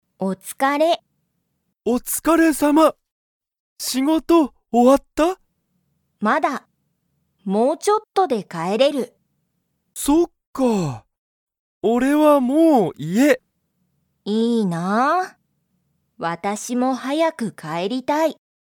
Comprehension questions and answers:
サキは、仕事しごとが終おわりましたか?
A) はい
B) いいえ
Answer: いいえ

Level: Level 1

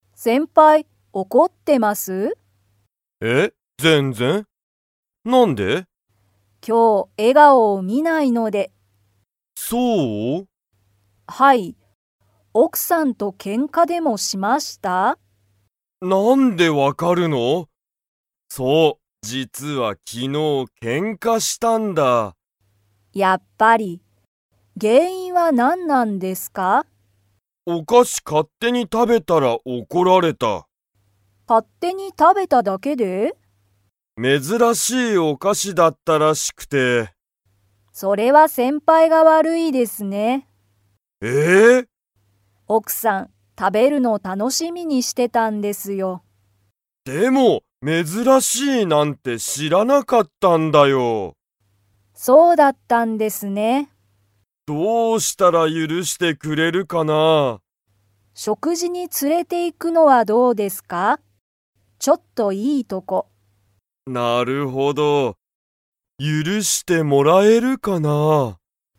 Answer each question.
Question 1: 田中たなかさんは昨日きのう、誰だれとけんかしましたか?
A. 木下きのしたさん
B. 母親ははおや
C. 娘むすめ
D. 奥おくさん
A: 奥おくさん

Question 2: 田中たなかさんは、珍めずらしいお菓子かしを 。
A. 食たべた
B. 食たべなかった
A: 食たべた

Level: Level 4

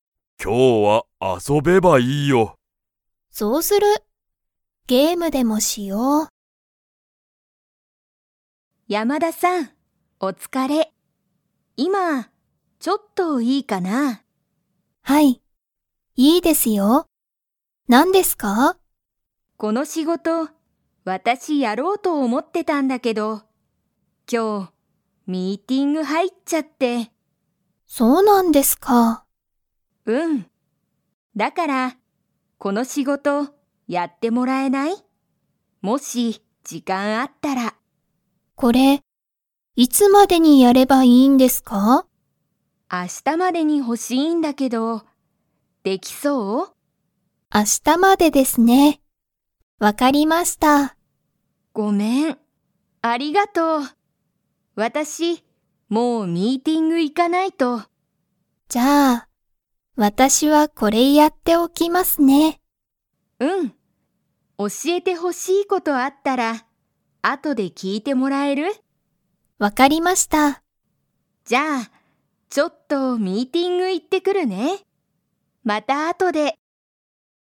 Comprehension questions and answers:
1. 松井まついさんは、____ミーティングが入はいってしまった。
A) 明日あした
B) 今日きょう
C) 毎日まいにち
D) いつも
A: 今日きょう

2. 山田やまださんは、その仕事しごとやりますか?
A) はい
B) いいえ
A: はい

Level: Level 2

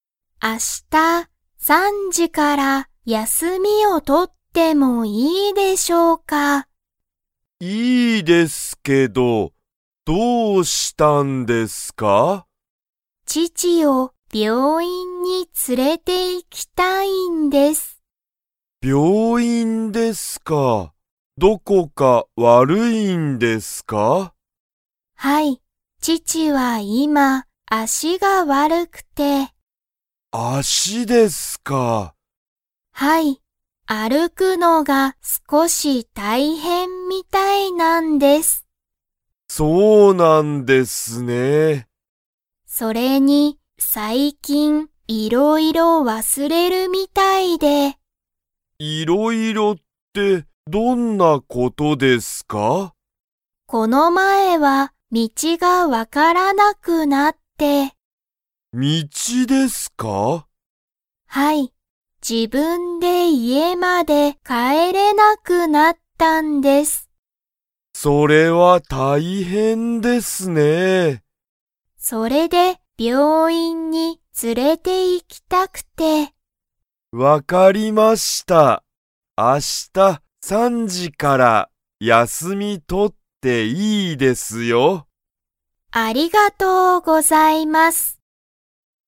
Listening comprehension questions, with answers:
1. 稲田(いなだ)さんの父(ちち)は、今(いま)、____が悪(わる)い。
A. 病院(びょういん)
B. 足(あし)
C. 休(やす)み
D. 家(いえ)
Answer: 足(あし)

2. 稲田(いなだ)さんは今日(きょう)、病院(びょういん)に行(い)きますか?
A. はい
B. いいえ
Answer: いいえ

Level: Level 2

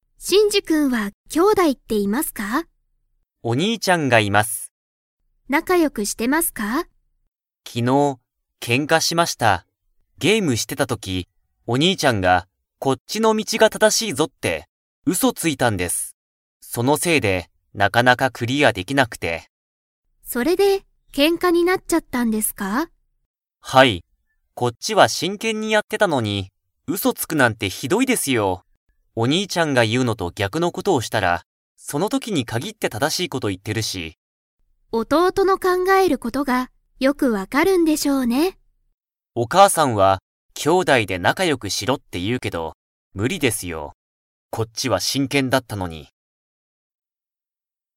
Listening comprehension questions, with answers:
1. 真治しんじくんがゲームしてた時とき、お兄にいちゃんは何なにをしましたか?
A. 本ほんを読よんでいた。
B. うそをついた。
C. 真剣しんけんに教おしえた。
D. 真治しんじくんと仲良なかよくした。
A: うそをついた。

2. 真治しんじくんは、ゲームを 。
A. すぐクリアできた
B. なかなかクリアできなかった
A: なかなかクリアできなかった

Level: Level 4

